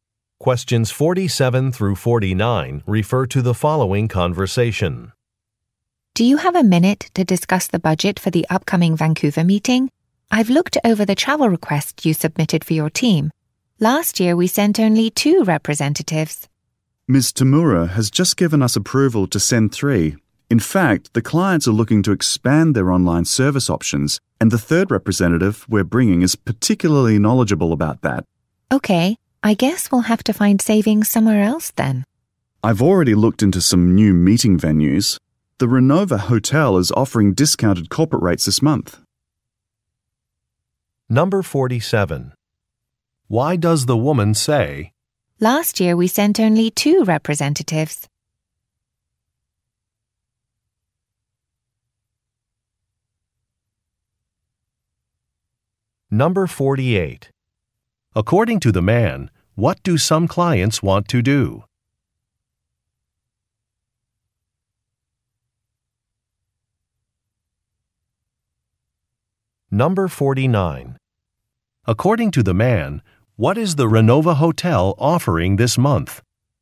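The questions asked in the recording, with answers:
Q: According to the man, what do some clients want to do?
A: Expand their online service options

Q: According to the man, what is the Renova Hotel offering this month?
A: Discounted corporate rates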